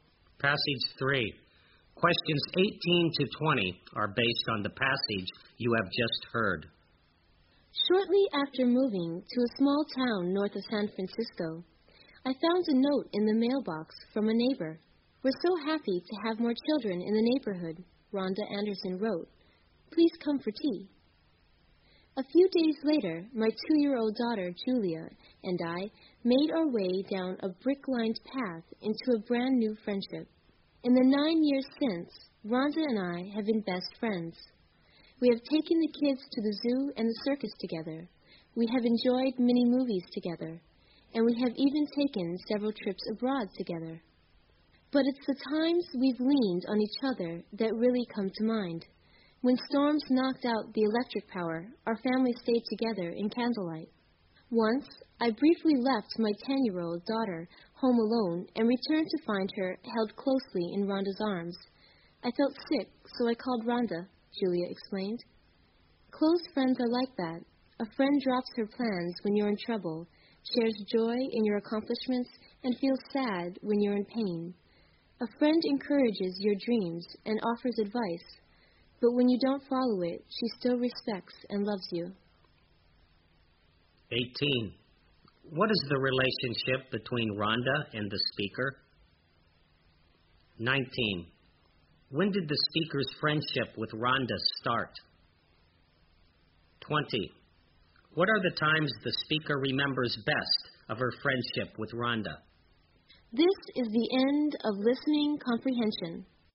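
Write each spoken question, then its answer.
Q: What is the relationship between Rhonda and the speaker?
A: Neighbors and best friends

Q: When did the speaker's friendship with Rhonda start?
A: Shortly after she moved to the town, nine years ago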